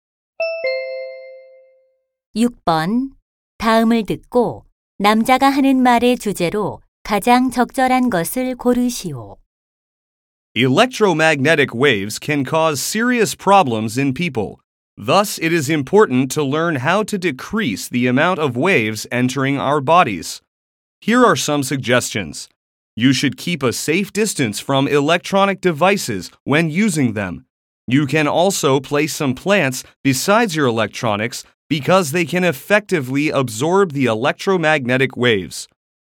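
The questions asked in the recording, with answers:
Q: 다음을 듣고 남자가 하는 말의 주제로 가장 적절한 것을 고르시오.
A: 전자파 노출을 줄이는 방법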